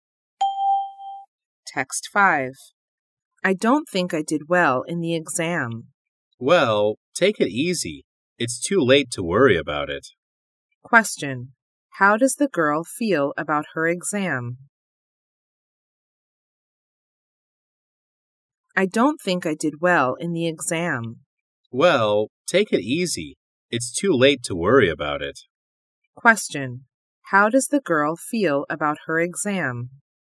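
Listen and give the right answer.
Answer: Worried; she thinks she didn't do well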